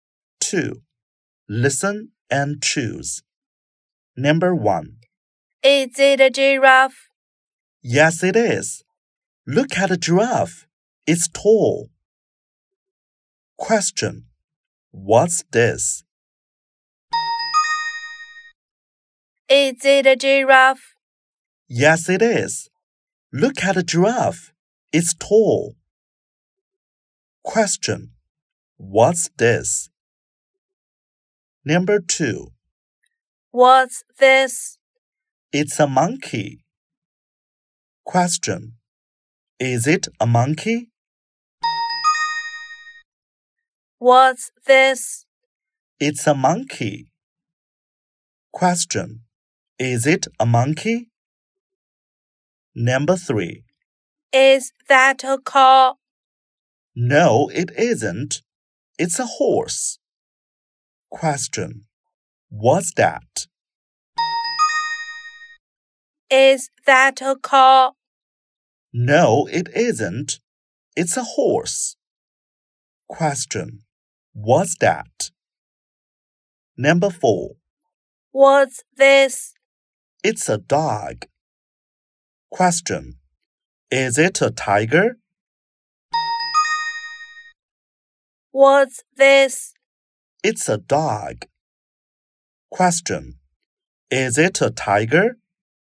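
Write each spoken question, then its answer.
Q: What's this?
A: It's a giraffe.

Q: Is it a monkey?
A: Yes, it is.

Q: What's that?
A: It's a horse.

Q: Is it a tiger?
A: No, it isn't. It's a dog.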